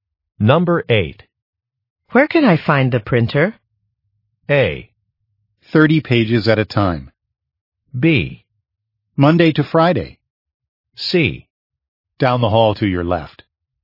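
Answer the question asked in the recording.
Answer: C: Down the hall to your left.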